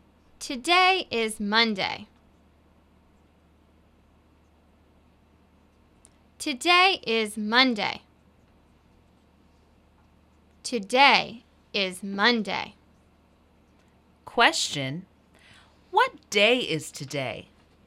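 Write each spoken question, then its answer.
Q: What day is today?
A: Monday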